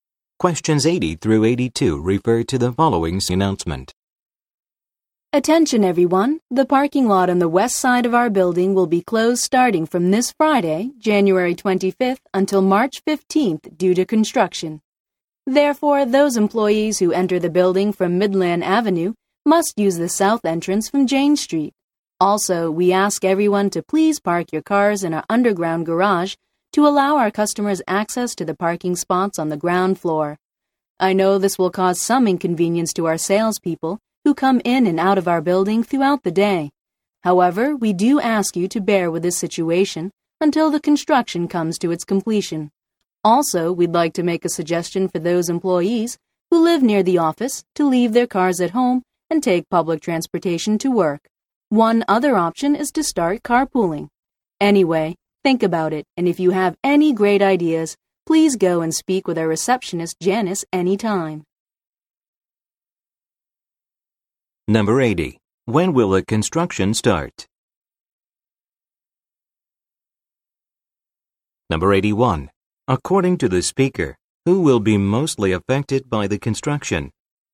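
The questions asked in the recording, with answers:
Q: When will the construction start?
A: This Friday, January 25th

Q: According to the speaker, who will be mostly affected by the construction?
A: Salespeople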